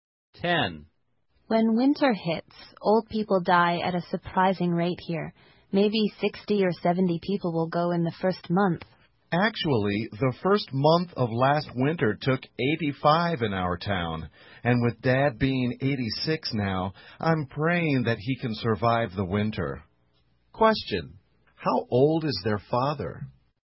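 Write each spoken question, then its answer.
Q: how old is their father?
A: 86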